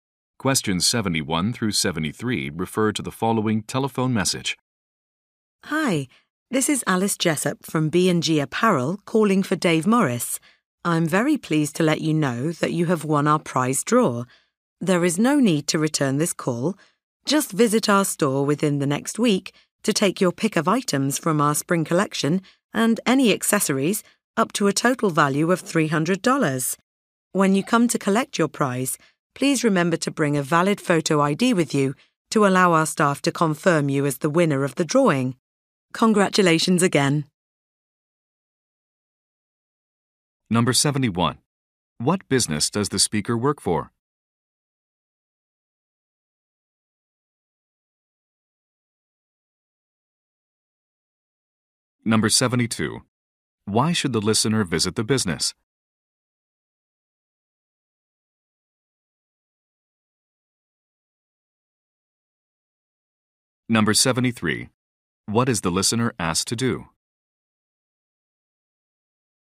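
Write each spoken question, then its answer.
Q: What business does the speaker work for?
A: A clothing store (B&G Apparel)

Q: Why should the listener visit the business?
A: To collect a prize he won in a prize draw

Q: What is the listener asked to do?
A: Bring a valid photo ID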